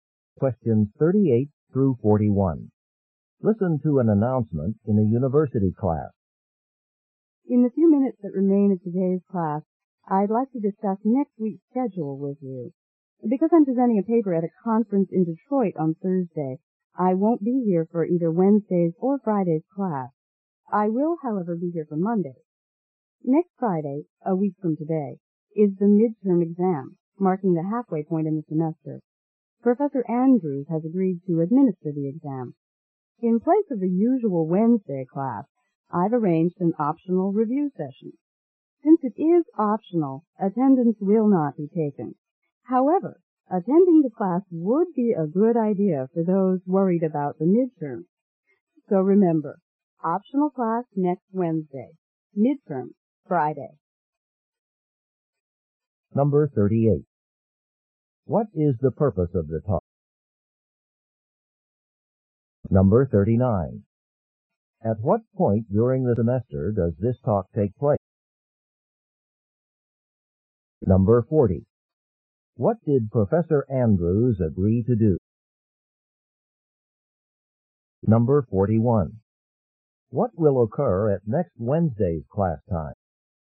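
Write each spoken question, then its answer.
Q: What is the purpose of the talk?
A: To discuss next week's schedule

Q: At what point during the semester does this talk take place?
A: A week before the midterm, close to the middle of the semester

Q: What did Professor Andrews agree to do?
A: Give the midterm exam

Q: What will occur at next Wednesday's class time?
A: An optional review session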